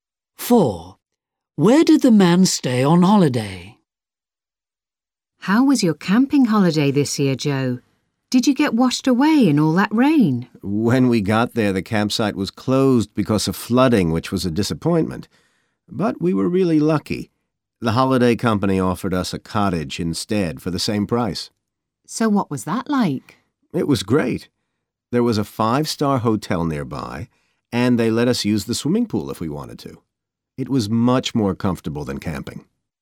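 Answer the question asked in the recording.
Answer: In a cottage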